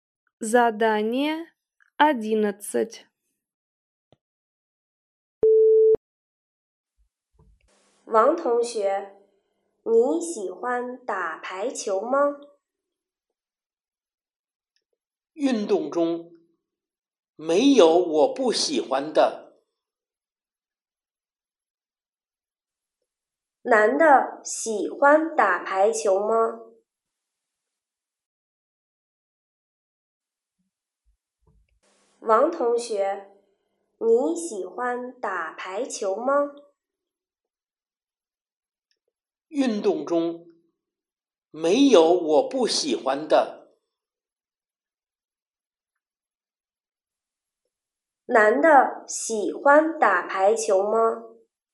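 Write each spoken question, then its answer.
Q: 男的喜欢打排球吗?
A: 喜欢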